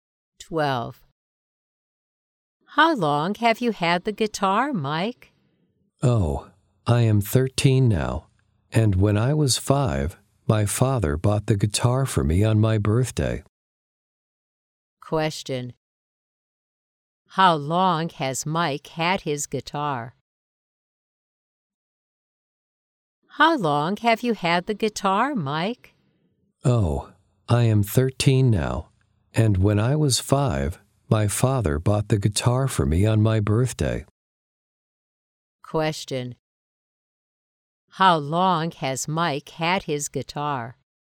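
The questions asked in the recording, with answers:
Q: Question: How long has Mike had his guitar?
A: For 8 years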